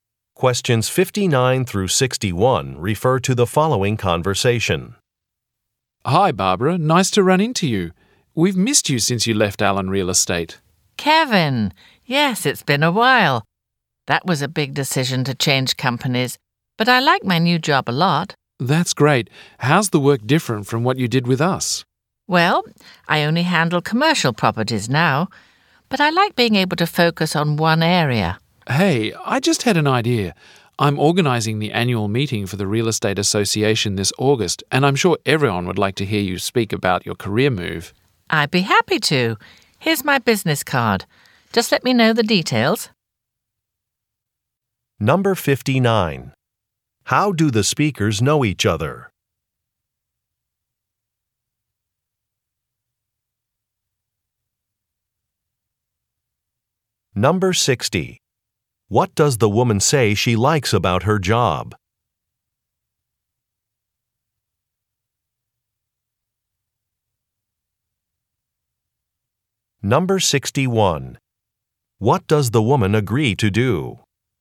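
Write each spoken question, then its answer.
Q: How do the speakers know each other?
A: They used to work together at Allen Real Estate

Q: What does the woman say she likes about her job?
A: Being able to focus on one area

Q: What does the woman agree to do?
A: Speak at the annual meeting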